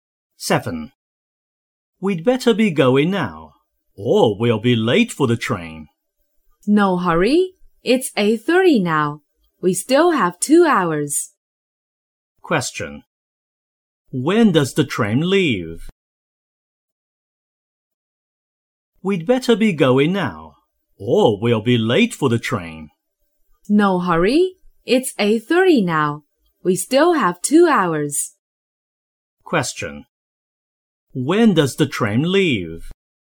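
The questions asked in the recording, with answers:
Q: When does the train leave?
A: At 10:30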